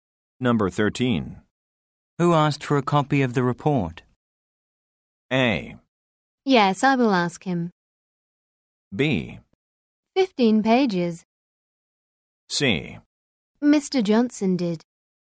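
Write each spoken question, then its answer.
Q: Who asked for a copy of the report?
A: C: Mr. Johnson did.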